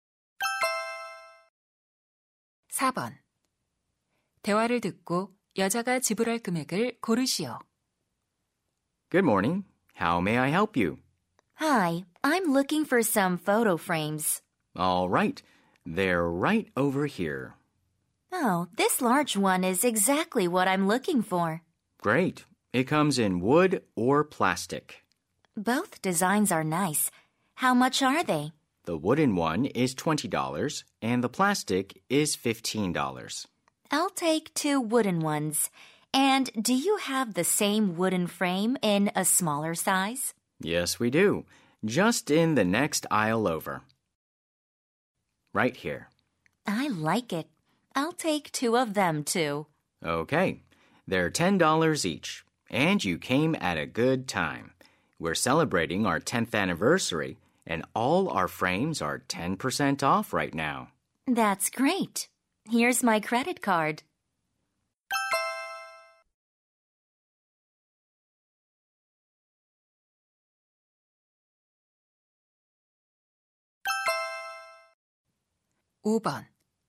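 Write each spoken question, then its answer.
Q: 여자가 지불할 금액을 고르시오.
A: $54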